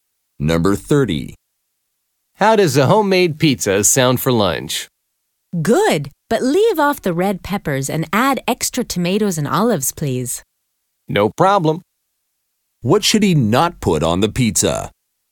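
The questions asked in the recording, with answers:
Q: What should he not put on the pizza?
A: Red peppers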